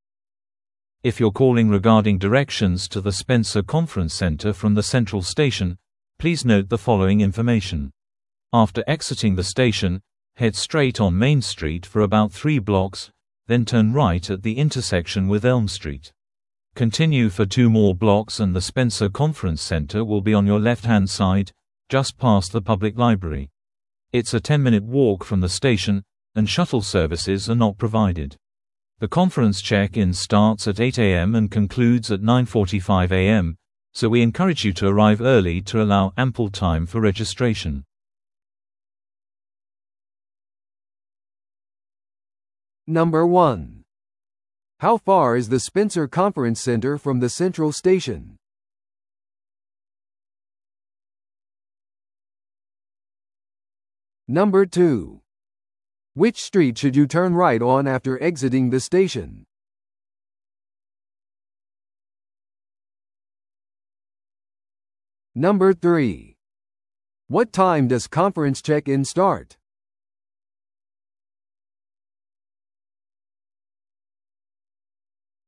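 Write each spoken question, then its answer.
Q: How far is the Spencer Conference Center from the Central Station?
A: A 10-minute walk

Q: Which street should you turn right on after exiting the station?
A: Elm Street

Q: What time does conference check-in start?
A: 8 a.m.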